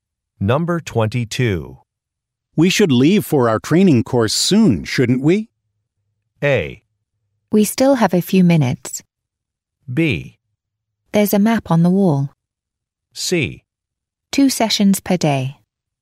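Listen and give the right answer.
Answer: A: We still have a few minutes.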